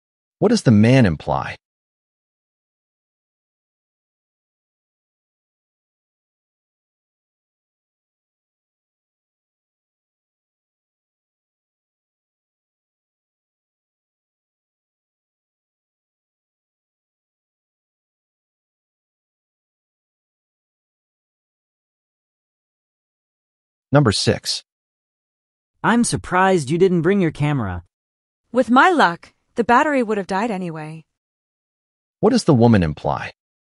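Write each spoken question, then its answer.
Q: What does the woman imply?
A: The camera wouldn't have been useful because she is unlucky.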